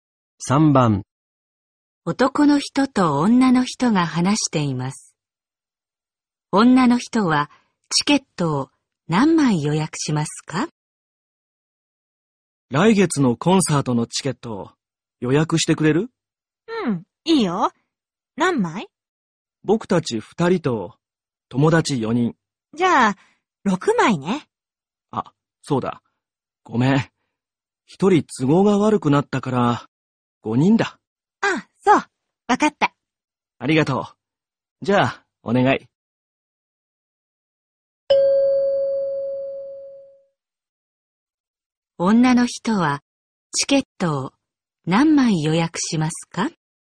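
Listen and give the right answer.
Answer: 5枚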